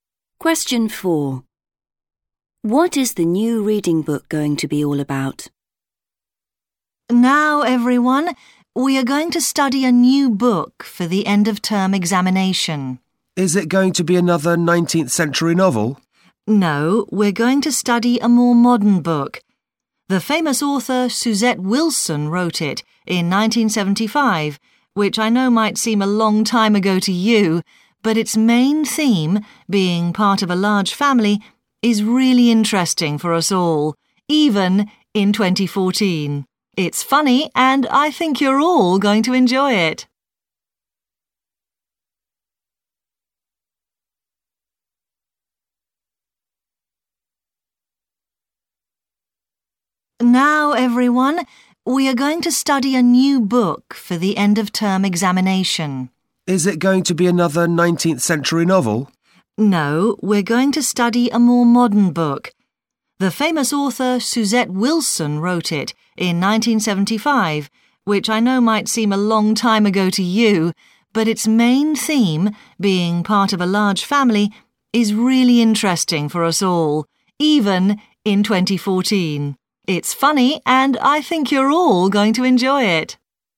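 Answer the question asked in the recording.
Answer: being part of a large family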